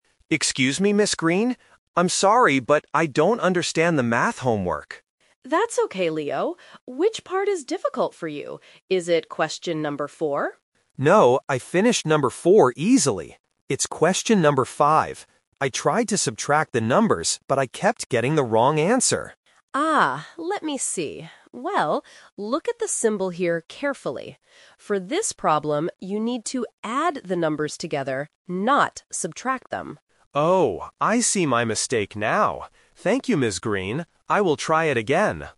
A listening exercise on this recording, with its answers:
Listen to the conversation between a student and a teacher, then choose the best answer (A, B, or C) for each question below.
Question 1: Which question does Leo need help with?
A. Question number four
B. Question number five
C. Question number six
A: Question number five

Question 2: Why did Leo get the wrong answer?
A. He subtracted the numbers.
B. He added the numbers.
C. He copied the wrong numbers.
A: He subtracted the numbers.

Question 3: What does Ms. Green tell Leo to do?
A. Ask a friend for help.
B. Subtract the numbers again.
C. Add the numbers together.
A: Add the numbers together.

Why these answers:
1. Leo clearly says, "It's question number five."
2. Leo explains his mistake by saying, "I tried to subtract the numbers..."
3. Ms. Green points out the symbol and says, "...you need to add the numbers together."

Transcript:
Leo: Excuse me, Ms. Green? I'm sorry, but I don't understand the math homework.
Ms. Green: That's okay, Leo. Which part is difficult for you? Is it question number four?
Leo: No, I finished number four easily. It's question number five. I tried to subtract the numbers, but I kept getting the wrong answer.
Ms. Green: Ah, let me see. Well, look at the symbol here carefully. For this problem, you need to add the numbers together, not subtract them.
Leo: Oh! I see my mistake now. Thank you, Ms. Green. I will try it again.

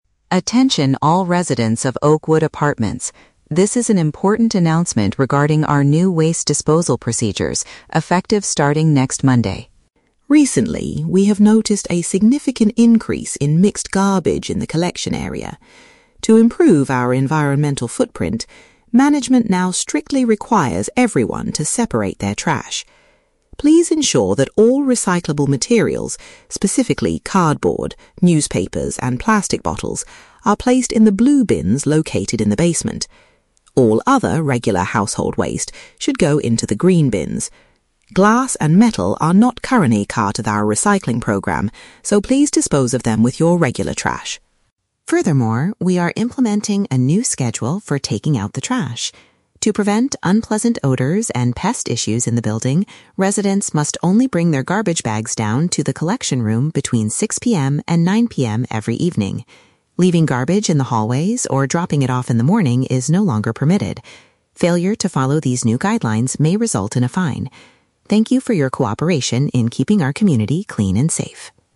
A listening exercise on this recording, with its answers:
Listen to the announcement from the apartment management. Then, read the questions and choose the correct answer (A, B, or C).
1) What items should residents put in the blue recycling bins?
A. Metal cans and glass jars.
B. Daily household food waste.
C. Paper products and plastic containers.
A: Paper products and plastic containers.

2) When are residents allowed to dispose of their trash?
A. Before they leave for work in the morning.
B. During a specific three-hour period in the evening.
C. Any time after 9:00 PM.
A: During a specific three-hour period in the evening.

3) Why did the building management decide to change the garbage schedule?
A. To stop bad smells and insect problems.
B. To avoid charging the residents a fine.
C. To make more room for the new blue bins.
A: To stop bad smells and insect problems.

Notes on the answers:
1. The speaker says to recycle "cardboard, newspapers, and plastic bottles," which are types of paper and plastic. Trap A is incorrect because the speaker explicitly states that glass and metal "are not currently part of our recycling program." Trap B is incorrect because regular household waste goes into the green bins, not the blue ones.
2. The announcement clearly states that residents must bring their bags down "between 6:00 PM and 9:00 PM every evening," which is a three-hour period. Trap A is incorrect because the speaker says "dropping it off in the morning is no longer permitted." Trap C is incorrect because the allowed window ends exactly at 9:00 PM.
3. The speaker mentions that the new schedule is implemented "To prevent unpleasant odors and pest issues in the building." "Unpleasant odors" means bad smells, and "pest issues" refers to insects or mice. Trap B is incorrect because a fine is a punishment for breaking the rules, not the reason the management created the schedule. Trap C is incorrect because making room for bins is never mentioned in the audio.

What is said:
Attention all residents of Oakwood Apartments. This is an important announcement regarding our new waste disposal procedures, effective starting next Monday.
Recently, we have noticed a significant increase in mixed garbage in the collection area. To improve our environmental footprint, management now strictly requires everyone to separate their trash. Please ensure that all recyclable materials, specifically cardboard, newspapers, and plastic bottles, are placed in the blue bins located in the basement. All other regular household waste should go into the green bins. Glass and metal are not currently part of our recycling program, so please dispose of them with your regular trash.
Furthermore, we are implementing a new schedule for taking out the trash. To prevent unpleasant odors and pest issues in the building, residents must only bring their garbage bags down to the collection room between 6:00 PM and 9:00 PM every evening. Leaving garbage in the hallways or dropping it off in the morning is no longer permitted. Failure to follow these new guidelines may result in a fine. Thank you for your cooperation in keeping our community clean and safe.

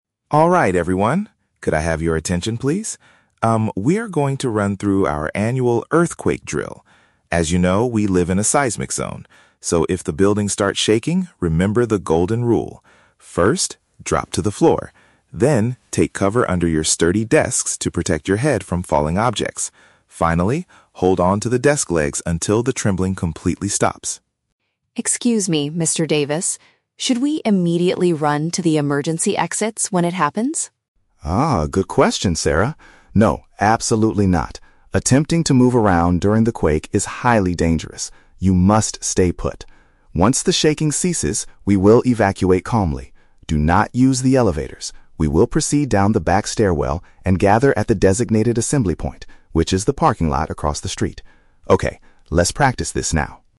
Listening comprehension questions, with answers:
Listen to a manager giving instructions about an earthquake drill and choose the correct answer (A, B, or C) for each question.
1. How should the staff protect themselves while the building is shaking?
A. By rushing to the emergency doors right away.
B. By hiding beneath a solid piece of furniture.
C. By standing next to the building's main pillars.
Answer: By hiding beneath a solid piece of furniture.

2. Why does the manager tell Sarah NOT to leave the office immediately?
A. Because walking while the ground is moving is extremely unsafe.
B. Because everyone needs to wait for the elevators to arrive.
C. Because the back stairs are usually blocked by falling objects.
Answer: Because walking while the ground is moving is extremely unsafe.

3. Where is the final meeting place after evacuating the building?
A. The bottom of the rear stairs.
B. A public park next to the company.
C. The car park on the other side of the road.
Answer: The car park on the other side of the road.

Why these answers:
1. The manager tells the staff to "take cover under your sturdy desks". "Hiding beneath" means taking cover, and a "solid piece of furniture" is a paraphrase for a sturdy desk. Why traps are wrong: Option (A) is the trap. Sarah asks if they should run to the emergency exits, but the manager says "No, absolutely not". Option (C) is a plausible earthquake survival myth, but it is never mentioned in the audio.
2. The manager says, "Attempting to move around during the quake is highly dangerous". "Walking while the ground is moving" is a paraphrase of moving around during the quake, and "extremely unsafe" means highly dangerous. Why traps are wrong: Option (B) is a trap because the manager explicitly says "Do not use the elevators". Option (C) mixes two different parts of the audio; he mentions "falling objects" (when hiding under the desk) and the "back stairwell" (for evacuation), but he doesn't say the stairs are blocked.
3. The manager states that the assembly point is "the parking lot across the street". "Car park" is a synonym for parking lot, and "on the other side of the road" means across the street. Why traps are wrong: Option (A) is a trap. They will walk down the back stairwell (rear stairs), but they will not stop at the bottom; they must go to the parking lot. Option (B) is a plausible location for an assembly point, but it is not mentioned.

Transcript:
Mr. Davis: Alright everyone, could I have your attention, please? Um, we are going to run through our annual earthquake drill. As you know, we live in a seismic zone. So, if the building starts shaking, remember the golden rule. First, drop to the floor. Then, take cover under your sturdy desks to protect your head from falling objects. Finally, hold on to the desk legs until the trembling completely stops.
Sarah: Excuse me, Mr. Davis. Should we immediately run to the emergency exits when it happens?
Mr. Davis: Ah, good question, Sarah. No, absolutely not. Attempting to move around during the quake is highly dangerous. You must stay put. Once the shaking ceases, we will evacuate calmly. Do not use the elevators. We will proceed down the back stairwell and gather at the designated assembly point, which is the parking lot across the street. Okay, let's practice this now.

